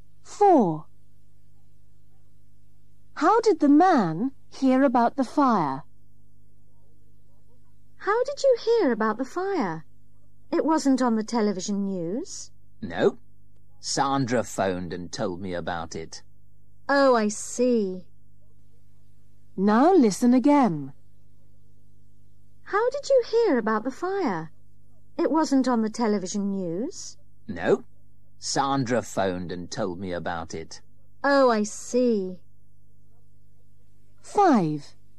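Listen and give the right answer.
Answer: Sandra phoned and told him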